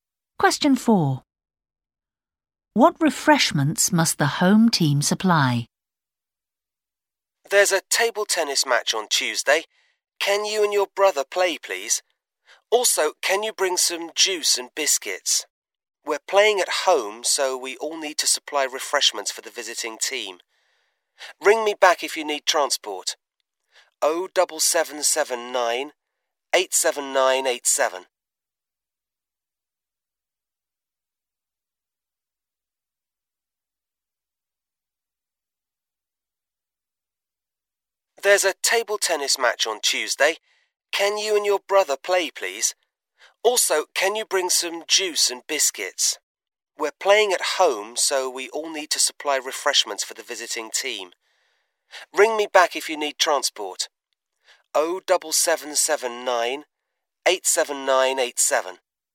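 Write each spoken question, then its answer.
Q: What refreshments must the home team supply?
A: Juice and biscuits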